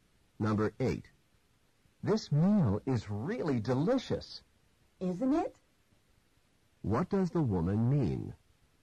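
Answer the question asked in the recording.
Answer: She agrees the meal is delicious.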